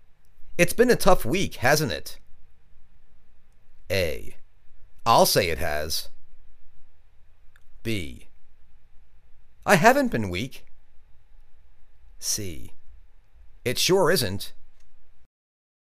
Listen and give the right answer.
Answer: I'll say it has!